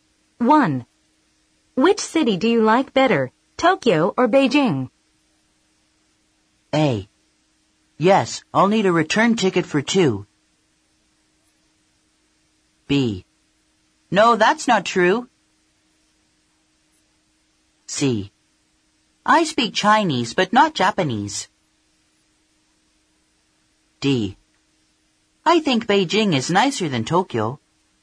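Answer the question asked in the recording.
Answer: D: I think Beijing is nicer than Tokyo.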